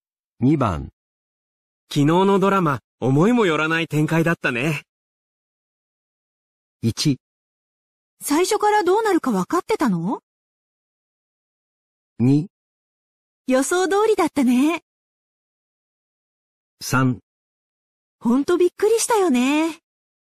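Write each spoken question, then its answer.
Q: 昨日のドラマ、思いもよらない展開だったね。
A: 3: ほんとびっくりしたよね。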